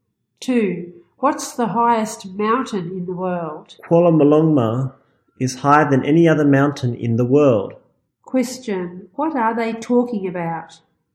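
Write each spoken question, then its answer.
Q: What are they talking about?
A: The highest mountain in the world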